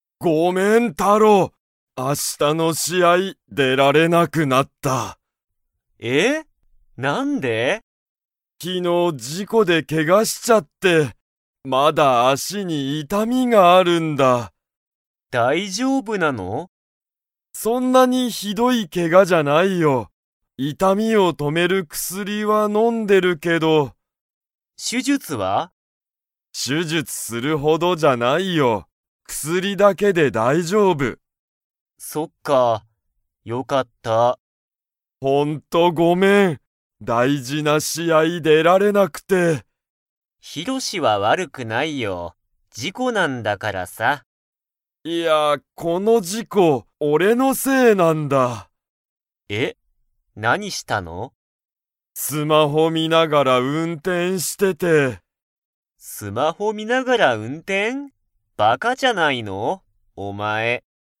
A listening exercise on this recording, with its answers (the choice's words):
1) ヒロシは、どこに痛いたみがありますか?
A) 頭あたま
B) 手て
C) 背中せなか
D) 足あし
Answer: 足あし

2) ヒロシは手術しゅじゅつを 。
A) する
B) しない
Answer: しない

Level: Level 4